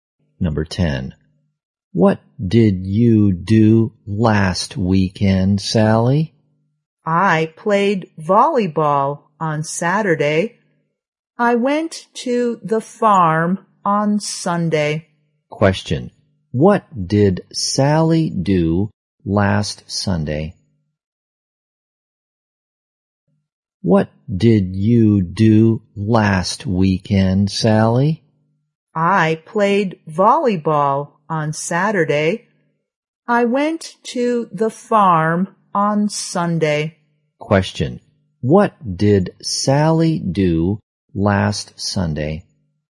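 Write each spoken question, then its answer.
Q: Question. What did Sally do last Sunday?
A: She went to the farm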